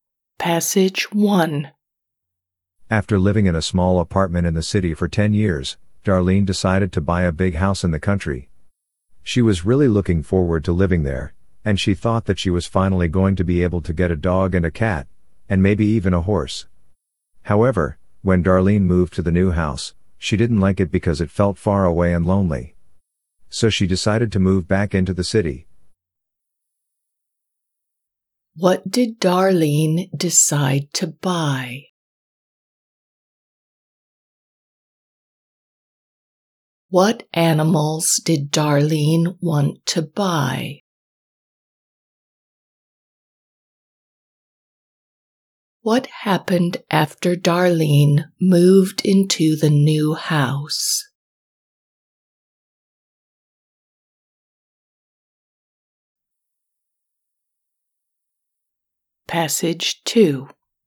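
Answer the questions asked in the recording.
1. a big house in the country
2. a dog, a cat, and maybe a horse
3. she didn't like it and moved back to the city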